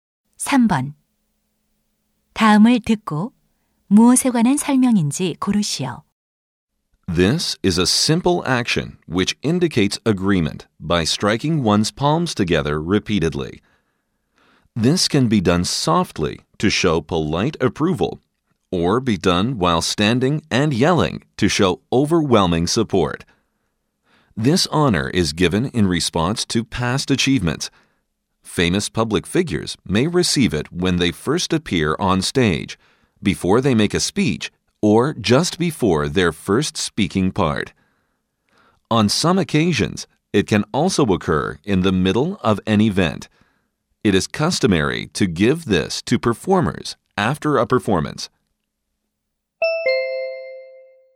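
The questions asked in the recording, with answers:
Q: 다음을 듣고 무엇에 관한 설명인지 고르시오.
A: 박수 (applause)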